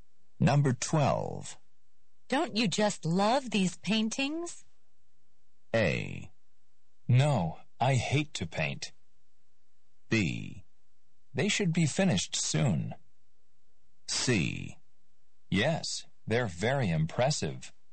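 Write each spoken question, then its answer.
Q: Don't you just love these paintings?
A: C: Yes, they're very impressive.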